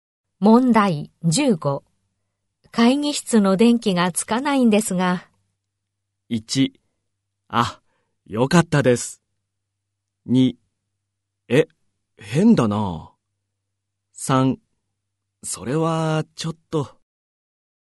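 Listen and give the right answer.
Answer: 2: え、変だな。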